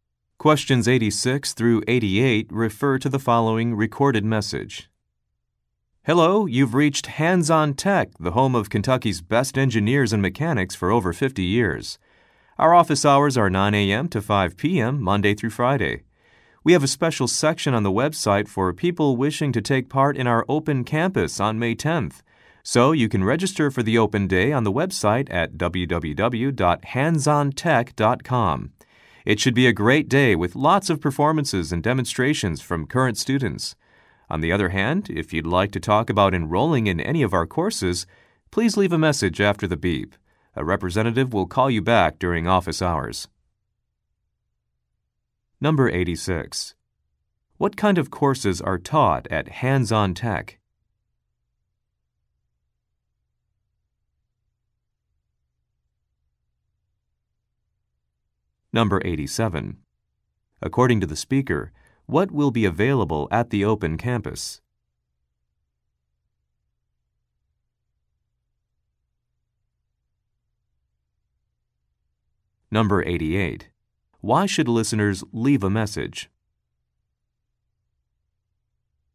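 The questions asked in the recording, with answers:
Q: What kind of courses are taught at Hands-On Tech?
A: Engineering and mechanics

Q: According to the speaker, what will be available at the open campus?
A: Performances and demonstrations by current students

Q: Why should listeners leave a message?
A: To talk about enrolling in a course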